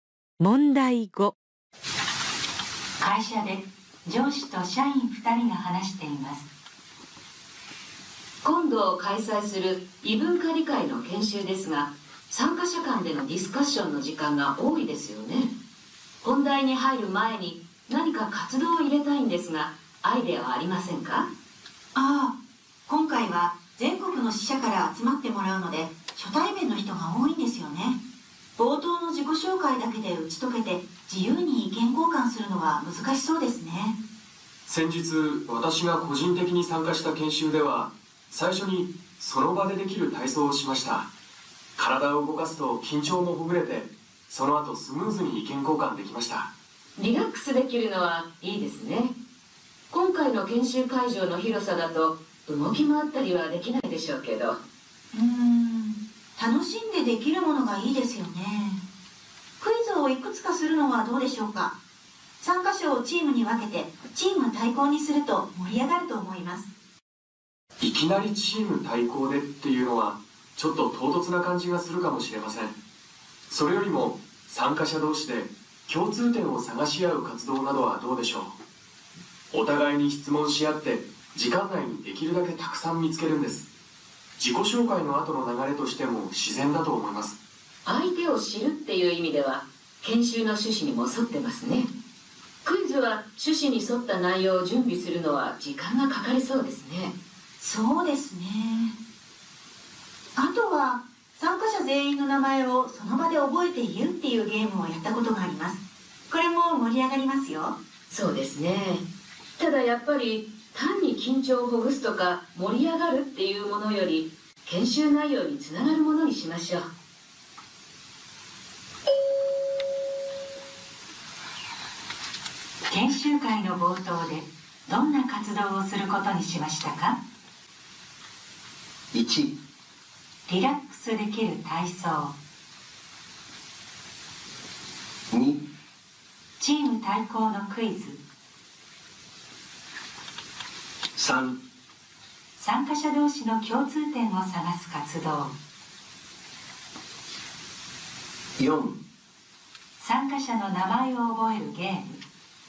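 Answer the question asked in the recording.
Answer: 3: 参加者同士の共通点を探す活動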